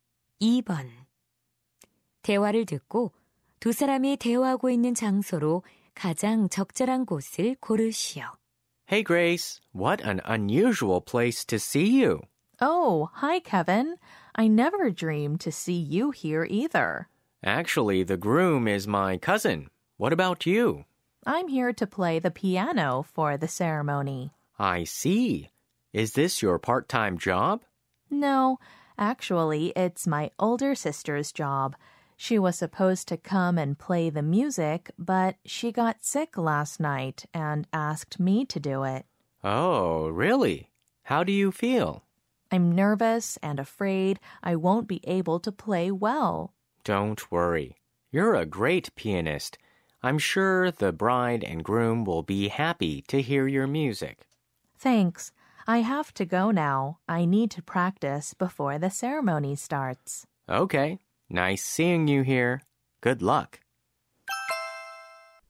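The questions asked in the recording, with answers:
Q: 대화를 듣고 두 사람이 대화하고 있는 장소로 가장 적절한 곳을 고르시오.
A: 결혼식장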